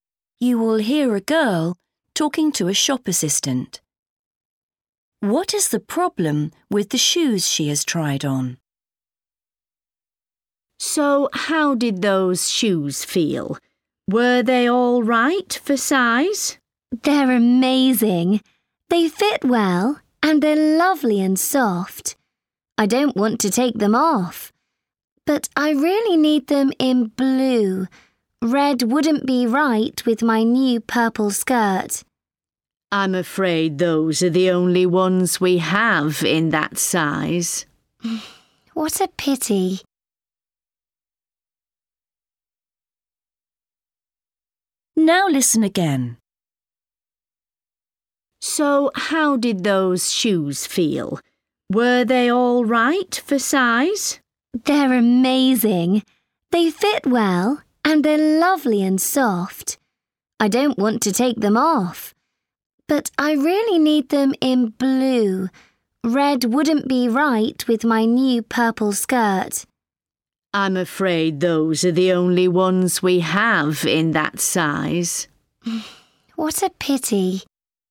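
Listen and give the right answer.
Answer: They are the wrong colour (red, she needs blue)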